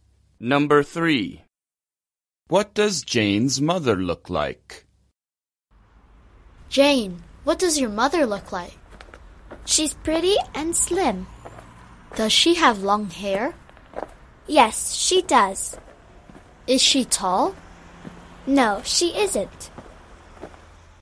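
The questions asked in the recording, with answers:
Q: What does Jane's mother look like?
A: Pretty, slim and short with long hair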